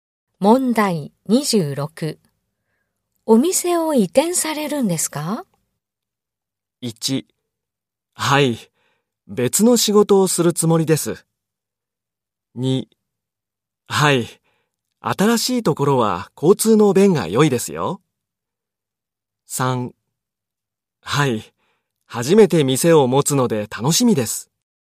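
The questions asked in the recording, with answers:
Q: お店を移転されるんですか?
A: 2: はい。新しいところは交通の便が良いですよ。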